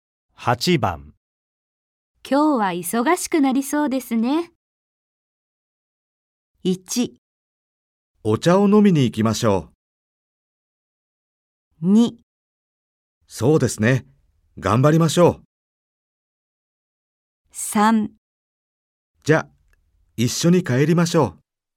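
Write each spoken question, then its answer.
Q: 今日は忙しくなりそうですね。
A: 2: そうですね。頑張りましょう。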